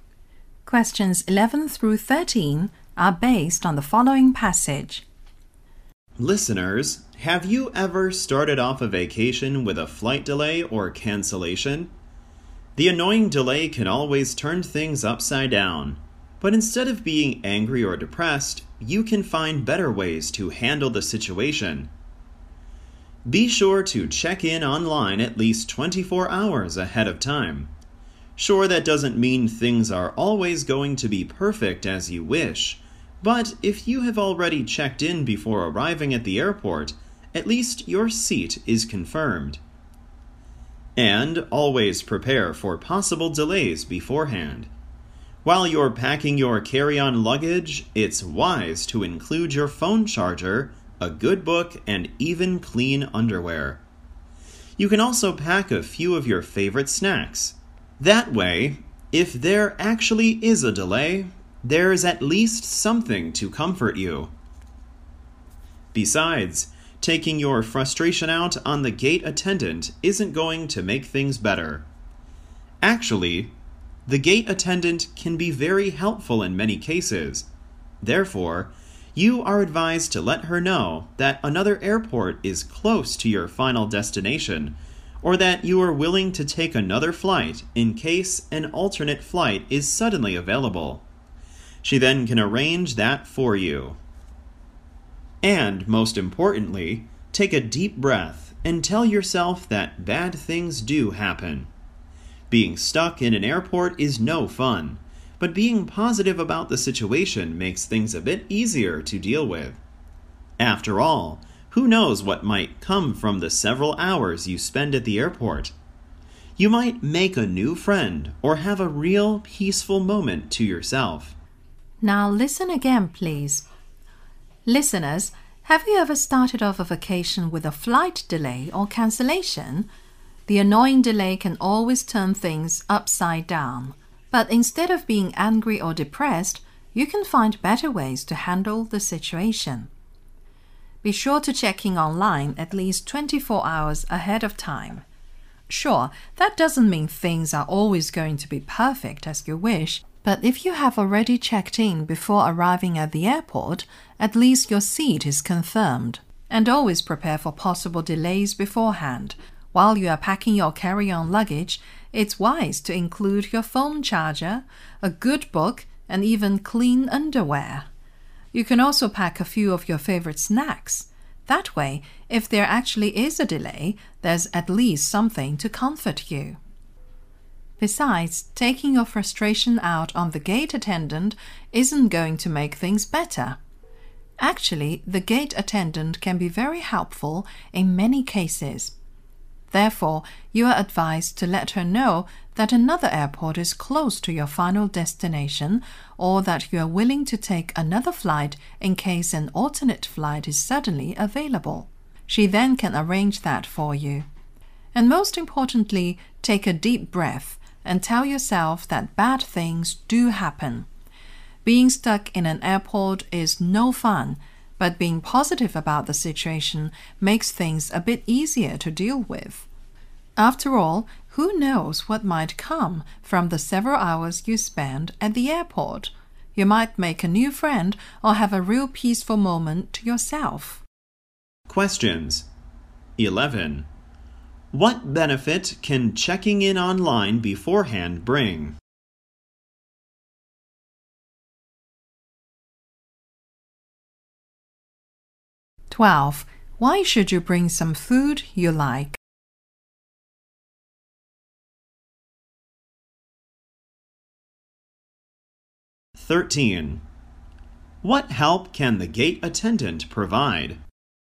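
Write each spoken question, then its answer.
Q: What benefit can checking in online beforehand bring?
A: Your seat is confirmed.

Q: Why should you bring some food you like?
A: To comfort you if there is a delay.

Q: What help can the gate attendant provide?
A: She can arrange another flight or a flight to a nearby airport.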